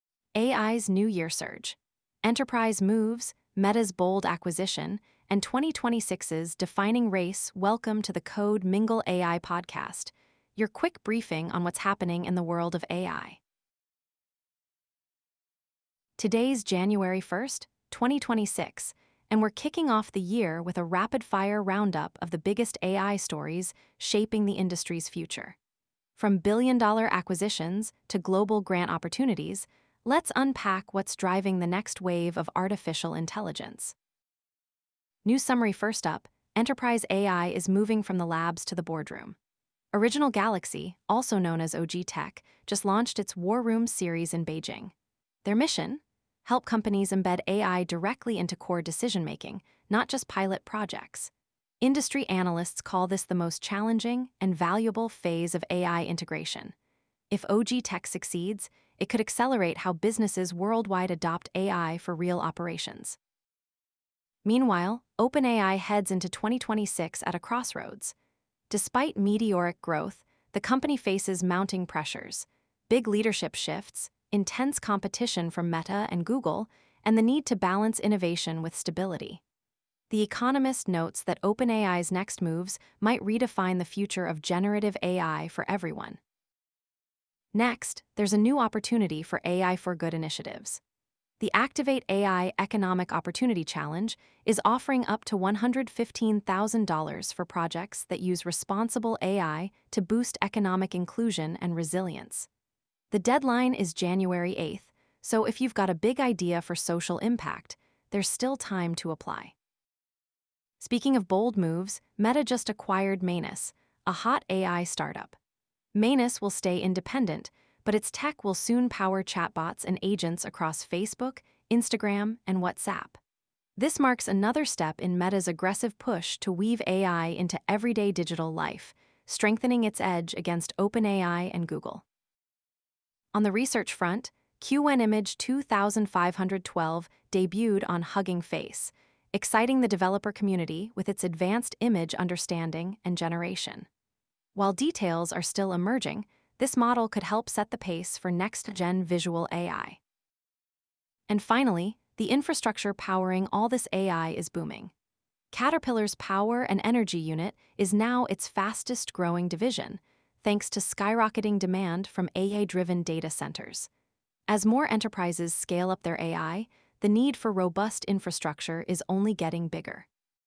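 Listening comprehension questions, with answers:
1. What is the primary goal of OG Tech's 'War Room' series launched in Beijing?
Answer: To move AI from pilot projects into core decision-making systems in enterprises

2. Why is 2026 considered a make-or-break year for OpenAI?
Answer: OpenAI faces major strategic and operational challenges amid rapid growth and competition

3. What is the maximum grant amount offered by the Activate AI Economic Opportunity Challenge 2026?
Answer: $115,000

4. What does Meta's acquisition of Manus indicate about its AI strategy?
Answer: An aggressive expansion in agent-based AI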